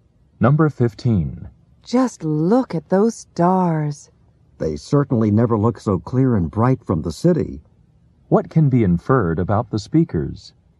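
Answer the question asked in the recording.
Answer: They are outside the city.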